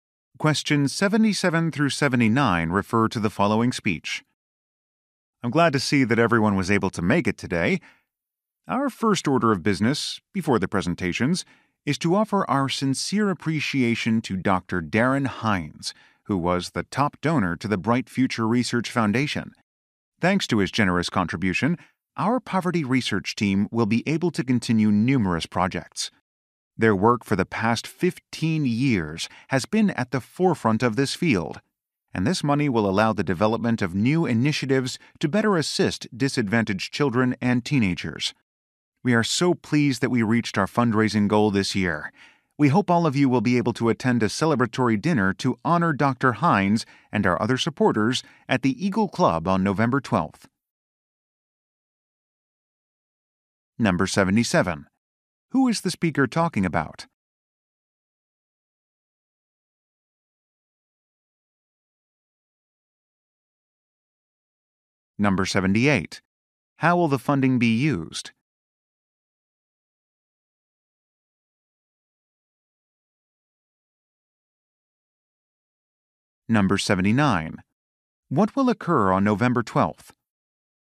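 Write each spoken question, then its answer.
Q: Who is the speaker talking about?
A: The top donor, Dr. Darren Hines

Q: How will the funding be used?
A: For poverty research projects to help disadvantaged children and teenagers

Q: What will occur on November 12th?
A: A celebratory dinner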